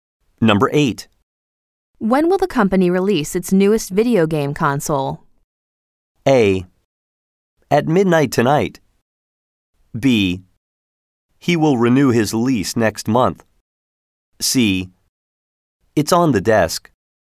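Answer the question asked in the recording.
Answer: A: At midnight tonight.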